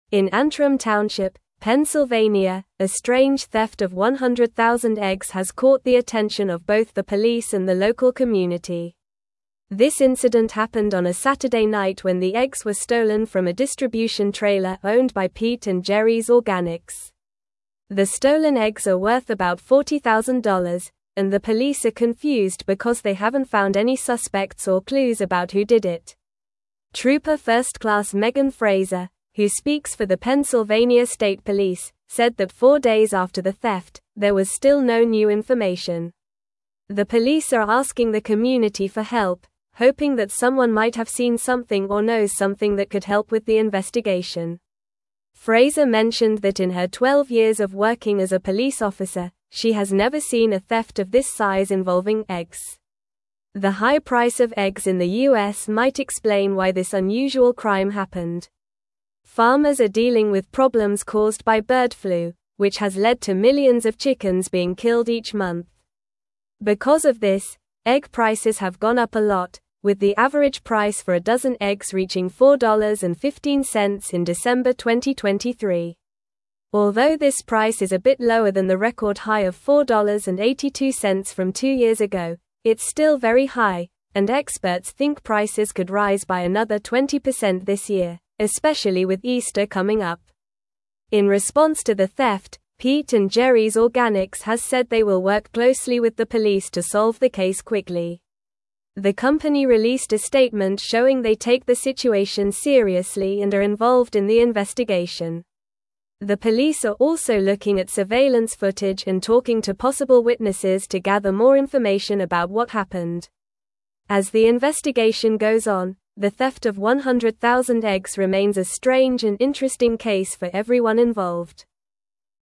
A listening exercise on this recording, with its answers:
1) This incident happened on a (1)______ night when the eggs were (2)______ from a distribution trailer owned by Pete & Gerry's Organics.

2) This incident happened on a (1)______ night when the eggs were (2)______ from a distribution trailer owned by Pete & Gerry's Organics.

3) The stolen eggs are worth about $40,000, and the police are (3)______ because they haven't found any suspects or clues about who did it.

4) Trooper First Class Megan (4)______, who speaks for the Pennsylvania State (5)______, said that four days after the theft, there was still no new information.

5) Trooper First Class Megan (4)______, who speaks for the Pennsylvania State (5)______, said that four days after the theft, there was still no new information.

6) Frazer mentioned that in her twelve years of working as a police officer, she has never seen a theft of this size (6)______ eggs.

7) The high (7)______ of eggs in the U.S. might explain why this (8)______ crime happened.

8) The high (7)______ of eggs in the U.S. might explain why this (8)______ crime happened.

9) Farmers are dealing with problems caused by bird flu, which has led to millions of (9)______ being (10)______ each month.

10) Farmers are dealing with problems caused by bird flu, which has led to millions of (9)______ being (10)______ each month.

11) Because of this, egg prices have gone up a lot, with the average price for a dozen eggs reaching $4.15 in (11)______ 2023.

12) Although this price is a bit lower than the record high of $4.82 from two years ago, it's still very high, and experts (12)______ prices could rise by another 20% this year, especially with Easter coming up.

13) In response to the theft, Pete & Gerry's (13)______ has said they will work closely with the police to solve the case quickly.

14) The police are also (14)______ at surveillance footage and talking to possible witnesses to (15)______ more information about what happened.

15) The police are also (14)______ at surveillance footage and talking to possible witnesses to (15)______ more information about what happened.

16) As the investigation goes on, the theft of 100,000 eggs (16)______ a strange and interesting case for everyone involved.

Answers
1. Saturday
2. stolen
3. confused
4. Frazer
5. Police
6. involving
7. price
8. unusual
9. chickens
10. killed
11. December
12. think
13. Organics
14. looking
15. gather
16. remains

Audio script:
In Antrim Township, Pennsylvania, a strange theft of 100,000 eggs has caught the attention of both the police and the local community. This incident happened on a Saturday night when the eggs were stolen from a distribution trailer owned by Pete & Gerry's Organics. The stolen eggs are worth about $40,000, and the police are confused because they haven't found any suspects or clues about who did it.
Trooper First Class Megan Frazer, who speaks for the Pennsylvania State Police, said that four days after the theft, there was still no new information. The police are asking the community for help, hoping that someone might have seen something or knows something that could help with the investigation. Frazer mentioned that in her twelve years of working as a police officer, she has never seen a theft of this size involving eggs.
The high price of eggs in the U.S. might explain why this unusual crime happened. Farmers are dealing with problems caused by bird flu, which has led to millions of chickens being killed each month. Because of this, egg prices have gone up a lot, with the average price for a dozen eggs reaching $4.15 in December 2023. Although this price is a bit lower than the record high of $4.82 from two years ago, it's still very high, and experts think prices could rise by another 20% this year, especially with Easter coming up.
In response to the theft, Pete & Gerry's Organics has said they will work closely with the police to solve the case quickly. The company released a statement showing they take the situation seriously and are involved in the investigation. The police are also looking at surveillance footage and talking to possible witnesses to gather more information about what happened. As the investigation goes on, the theft of 100,000 eggs remains a strange and interesting case for everyone involved.

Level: Level 3